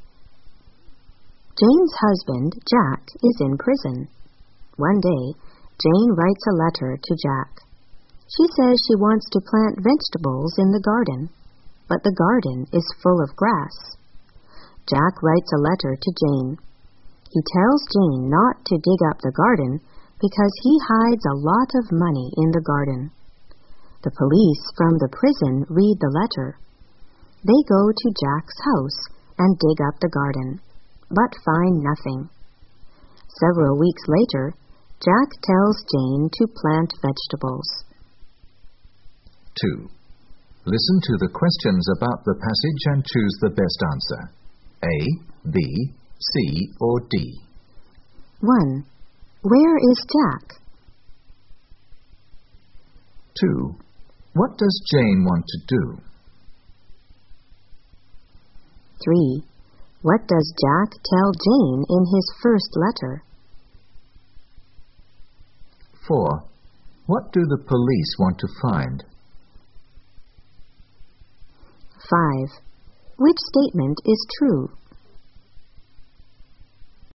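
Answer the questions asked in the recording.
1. In prison
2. Plant vegetables in the garden
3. Not to dig up the garden because he hid a lot of money there
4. The money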